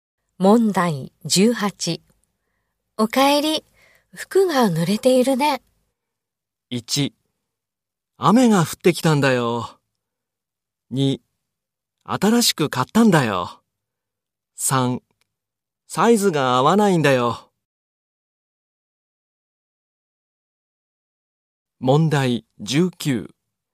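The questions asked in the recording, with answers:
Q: おかえり、服が濡れているね。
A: 1: 雨が降ってきたんだよ。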